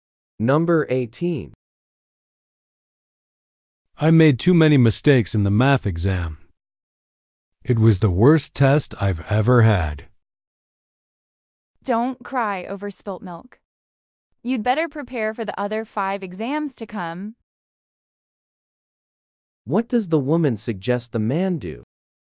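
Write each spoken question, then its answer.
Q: What does the woman suggest the man do?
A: Stop worrying about it and prepare for the other exams.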